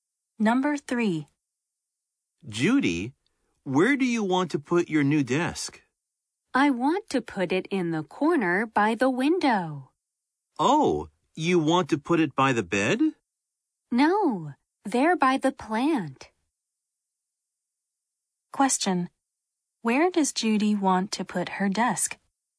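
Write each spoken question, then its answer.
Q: Where does Judy want to put her desk?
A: In the corner by the window, by the plant.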